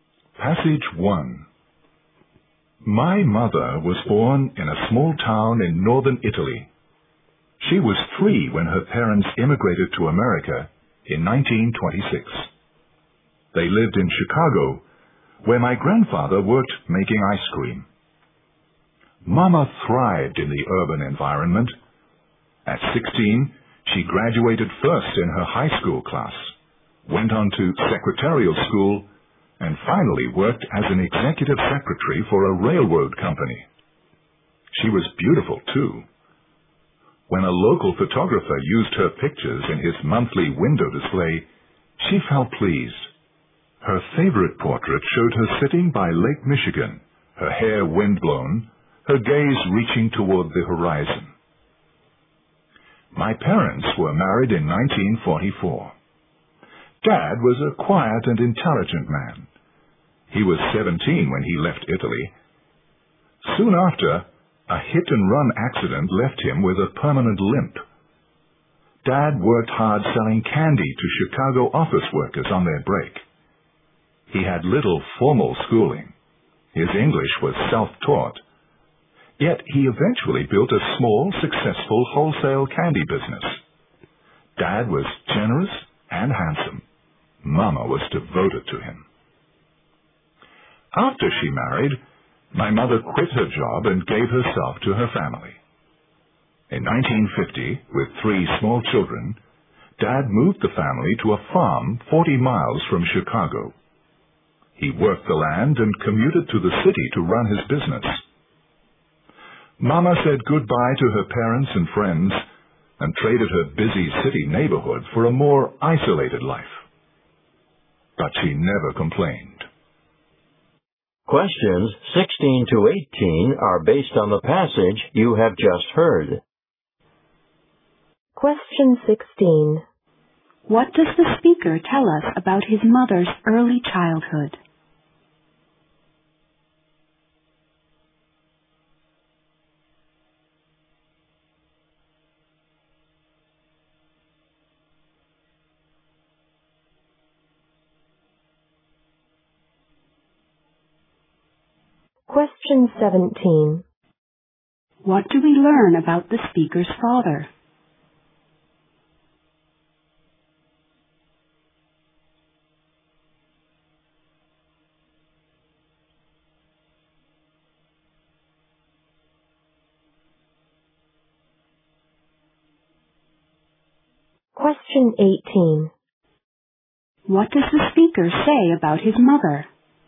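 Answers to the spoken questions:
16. She was taken to America by her parents at the age of three
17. He had little schooling but built a successful candy business
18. She gave up her job for her family and never complained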